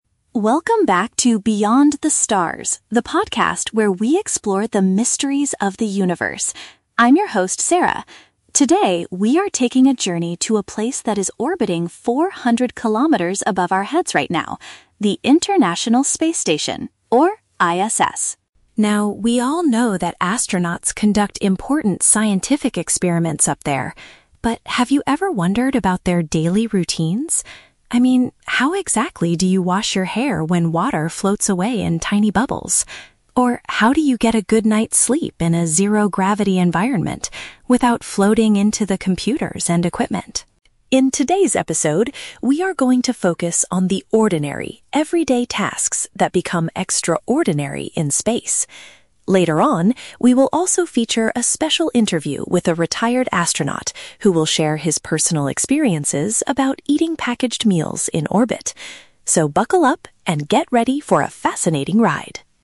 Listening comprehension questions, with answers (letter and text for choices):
Listen to the introduction of a podcast about space exploration and choose the correct answer (A, B, or C) for each question.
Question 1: What is the main focus of today's podcast episode?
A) How space travelers perform normal daily activities.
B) The complex scientific research happening on the station.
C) How the International Space Station was originally built.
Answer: A) How space travelers perform normal daily activities.

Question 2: What specific zero-gravity challenge does the host mention?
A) Keeping physical exercise routines to stay healthy.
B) Stopping technical equipment from floating away.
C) Taking care of personal hygiene using floating liquids.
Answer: C) Taking care of personal hygiene using floating liquids.

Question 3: What will happen later in the broadcast?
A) A former space explorer will talk about his time in orbit.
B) A scientist will demonstrate how to cook space food.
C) The host will answer live phone calls from the listeners.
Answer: A) A former space explorer will talk about his time in orbit.

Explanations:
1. The host says they will focus on "the ordinary, everyday tasks" and mentions "daily routines" like washing hair and sleeping. Option (A) perfectly paraphrases this ("space travelers" = astronauts, "normal daily activities" = everyday tasks). Option (B) is a trap; "scientific experiments" are mentioned, but the host says "we all know that... But have you ever wondered about..." indicating a shift away from science to daily life. Option (C) is a plausible topic for a space podcast but is never mentioned.
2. The host asks, "how exactly do you wash your hair when water floats away in tiny bubbles?" Option (C) uses synonyms to express this ("personal hygiene" = wash your hair, "floating liquids" = water floats away). Option (B) is a trap; "floating" and "equipment" are mentioned, but the host talks about the astronauts floating into the equipment, not the equipment itself floating away. Option (A) is a logical guess for space challenges, but exercising is not mentioned in this intro.
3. The host states there will be a "special interview with a retired astronaut who will share his personal experiences." Option (A) accurately paraphrases this ("former space explorer" = retired astronaut, "talk about his time" = share personal experiences). Option (B) is a trap; "eating packaged meals" is mentioned, but they are interviewing an astronaut, not watching a scientist cook. Option (C) is a common podcast activity but is not mentioned here.

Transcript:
Podcast Host: Welcome back to Beyond the Stars, the podcast where we explore the mysteries of the universe. I'm your host, Sarah. Today, we are taking a journey to a place that is orbiting 400 kilometers above our heads right now: the International Space Station, or ISS.
Now, we all know that astronauts conduct important scientific experiments up there. But have you ever wondered about their daily routines? I mean, how exactly do you wash your hair when water floats away in tiny bubbles? Or how do you get a good night's sleep in a zero-gravity environment without floating into the computers and equipment?
In today's episode, we are going to focus on the ordinary, everyday tasks that become extraordinary in space. Later on, we will also feature a special interview with a retired astronaut who will share his personal experiences about eating packaged meals in orbit. So, buckle up and get ready for a fascinating ride!